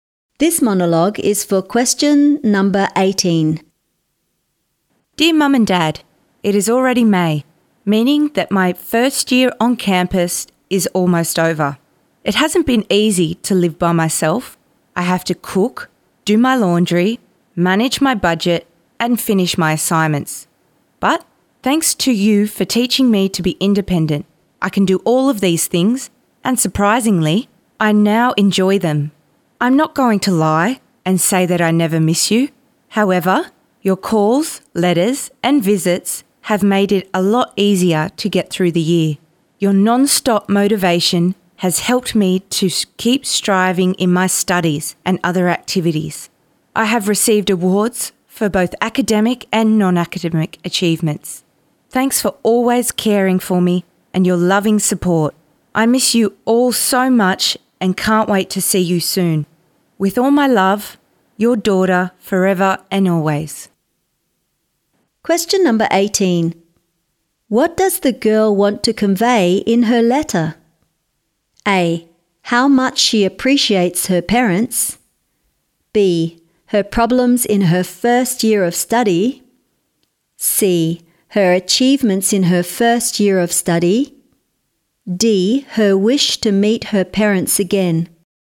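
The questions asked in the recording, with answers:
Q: What does the girl want to convey in her letter?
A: A: How much she appreciates her parents.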